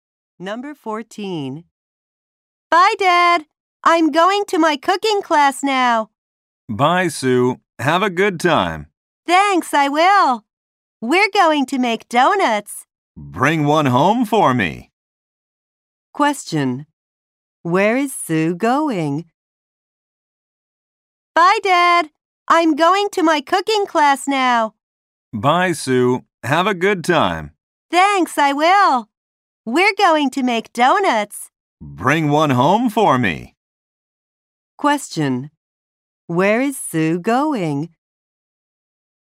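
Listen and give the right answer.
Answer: To her cooking class.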